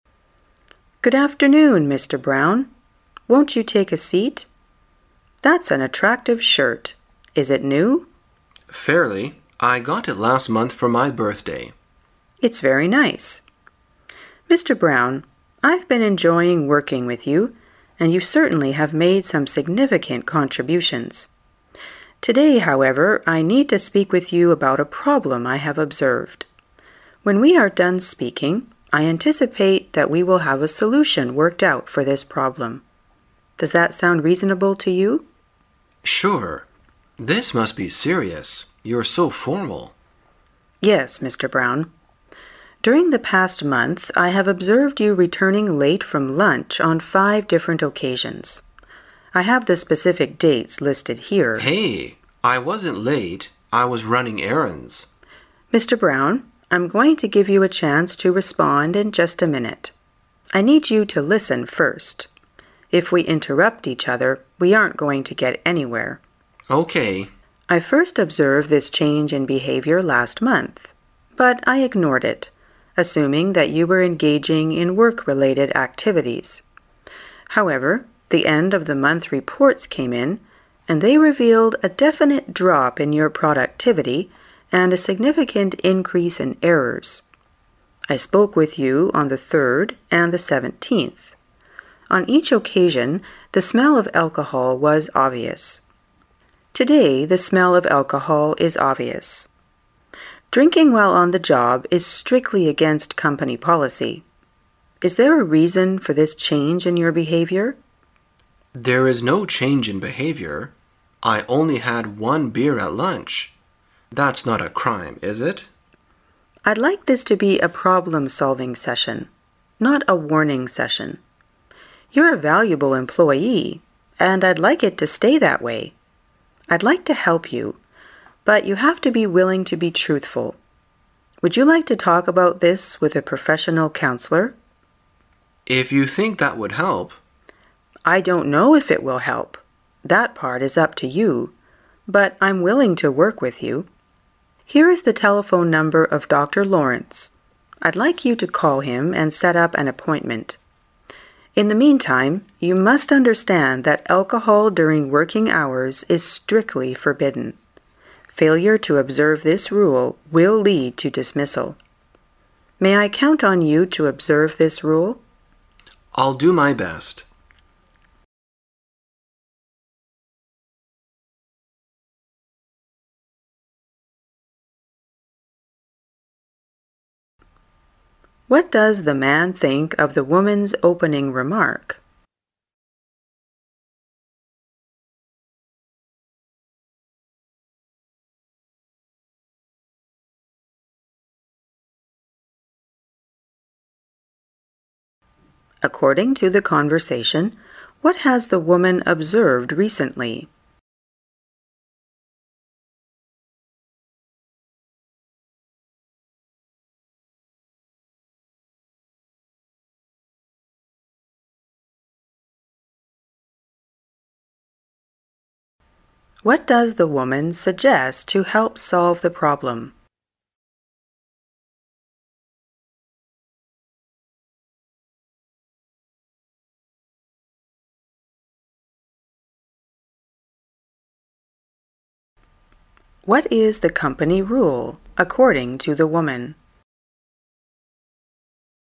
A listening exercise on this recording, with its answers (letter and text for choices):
According to the conversation, what has the woman observed recently?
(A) The man has always been a valuable employee.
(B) The man has often been late for work after lunch.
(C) The man has been addicted to alcohol while running errands.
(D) The man has been engaging in work-related activities.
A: (B) The man has often been late for work after lunch.

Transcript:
[解析] 27-30 W: Good afternoon, Mr Brown. Won't you take a seat? That's an attractive shirt. Is it new? M: Fairly. I got it last month for my birthday. W: It's very nice. Mr Brown, I've been enjoying working with you, and you certainly have made some significant contributions. Today, however, I need to speak with you about a problem I have observed. When we are done speaking, I anticipate that we will have a solution worked out for this problem. Does that sound reasonable to you? M: Sure. This must be serious. You're so formal. W: Yes Mr Brown. During the past month, I have observed you returning late from lunch on five different occasions. I have the specific dates listed here... M: Hey, I wasn't late. I was running errands. W: Mr Brown, I'm going to give you a chance to respond in just a minute. I need you to listen first. If we interrupt each other, we aren't going to get anywhere. W: I first observed this change in behavior last month, but I ignored it, assuming that you were engaging in work-related activities. However, the end-of-the month reports came in, and they revealed a definite drop in your productivity and a significant increase in errors. I spoke with you on the third and the seventeenth. On each occasion, the smell of alcohol was obvious. Today the smell of alcohol is obvious. Drinking while on the job is strictly against company policy. Is there a reason for this change in your behavior? M: There is no change in behavior. I only had one beer at lunch That's not a crime, is it? W: I'd like this to be a problem-solving session—not a warning session. You're a valuable employee, and I'd like it to stay that way. I'd like to help you, but you have to be willing to be truthful. Would you like to talk about this with a professional counselor? M: If you think that would help. W: I don't know if it will help. That part is up to you, but I'm willing to work with you. Here is the telephone number of Dr Lawrence. I'd like you to call him and set up an appointment. In the meantime, you must understand that alcohol during working hours is strictly forbidden, Failure to observe this rule will lead to dismissal. May I count on you to observe this rule? M: I'll do my best. What does the man think of the woman's opening remark?